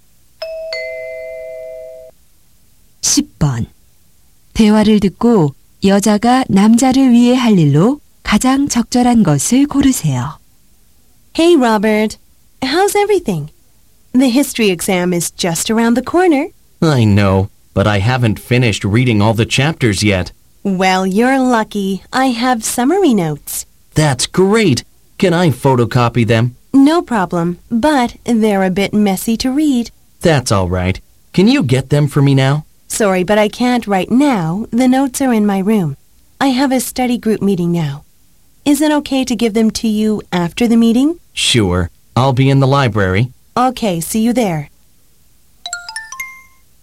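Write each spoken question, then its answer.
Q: 대화를 듣고 여자가 남자를 위해 할 일로 가장 적절한 것을 고르세요.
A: 도서관에 요약 노트 가져다주기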